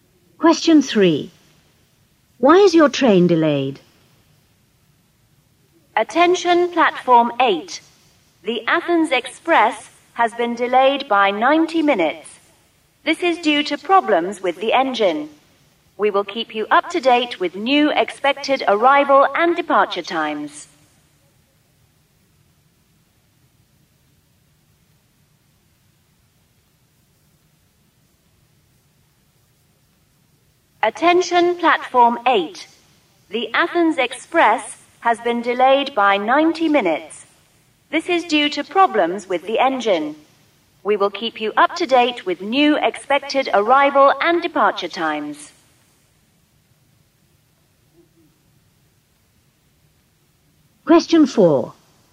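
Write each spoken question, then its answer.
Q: Why is your train delayed?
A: Problems with the engine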